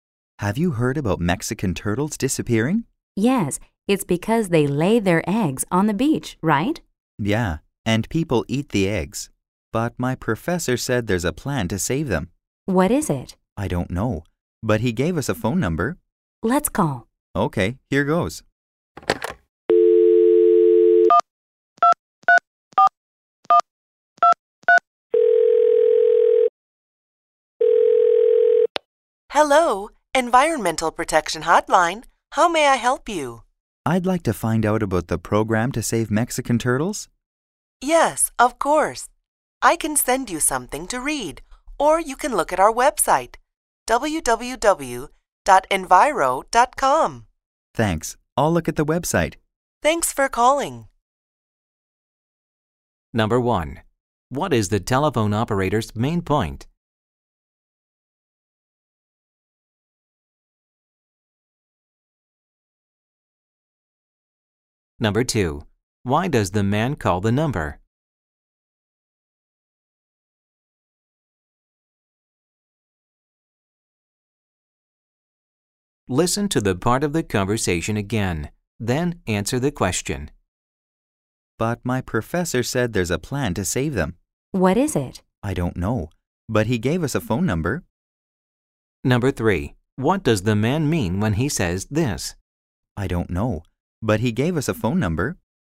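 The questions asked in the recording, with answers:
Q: Why does the man call the number?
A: To find out about the program to save Mexican turtles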